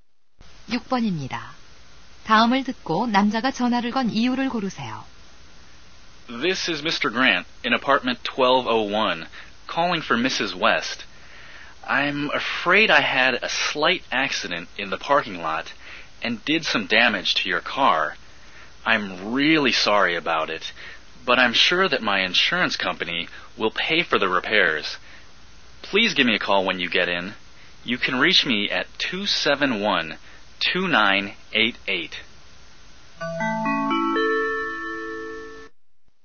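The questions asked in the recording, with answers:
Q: 다음을 듣고 남자가 전화를 건 이유를 고르세요.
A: 주차장에서 차를 손상시킨 것을 사과하려고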